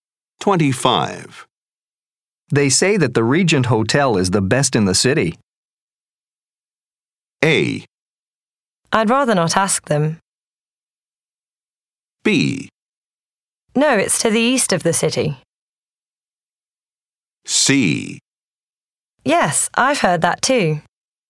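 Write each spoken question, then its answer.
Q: They say that the Regent Hotel is the best in the city.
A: C: Yes, I've heard that too.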